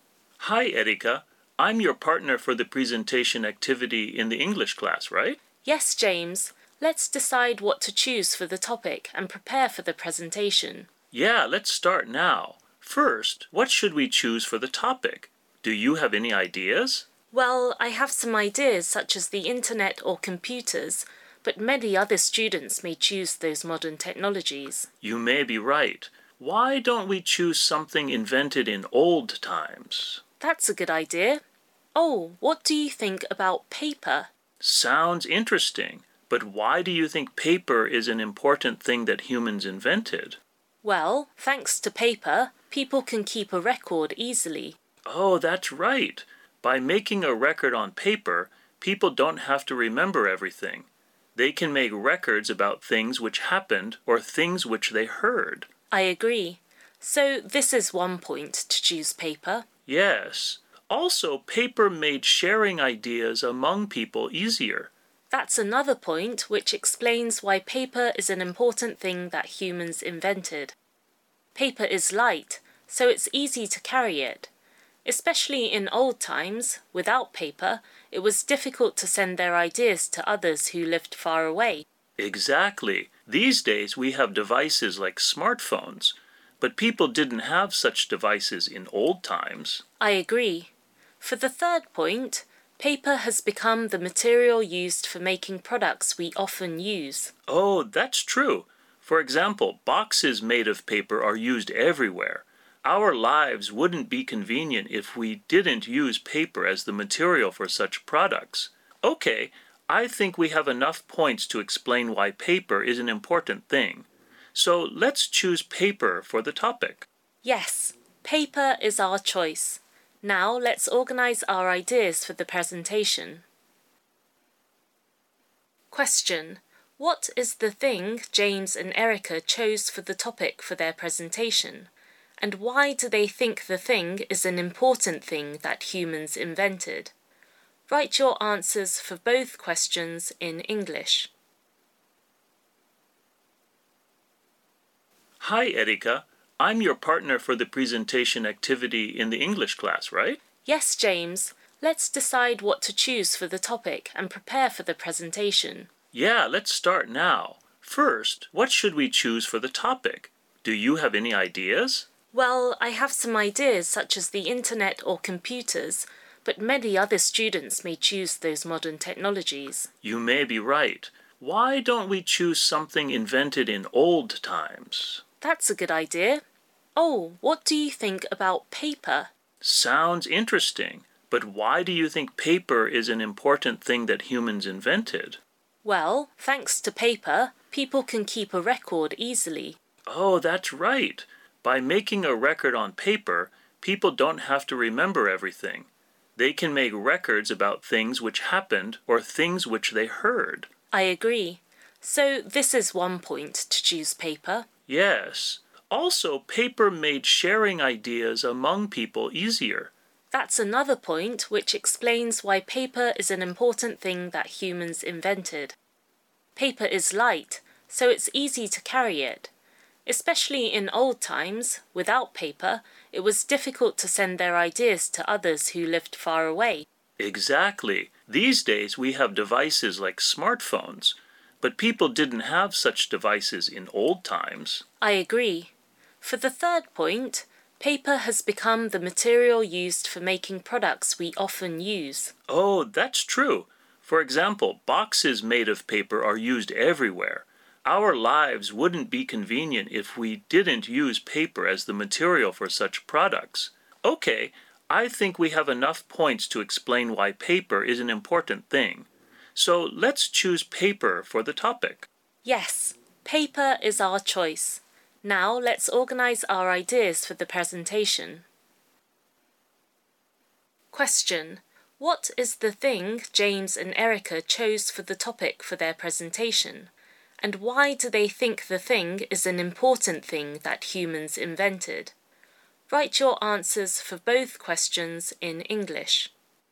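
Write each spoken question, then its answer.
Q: what is the thing James and Erica chose for the topic for their presentation?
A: Paper

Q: And why do they think the thing is an important thing that humans invented?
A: Paper lets people keep records easily, makes sharing ideas with others easier, and is the material for products we often use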